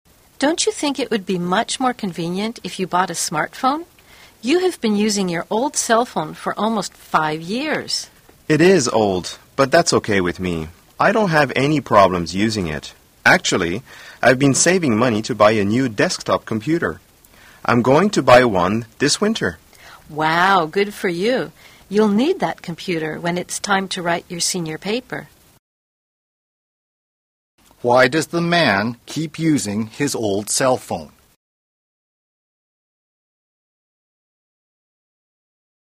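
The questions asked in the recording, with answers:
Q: Why does the man keep using his old cell phone?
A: He is saving money to buy a new desktop computer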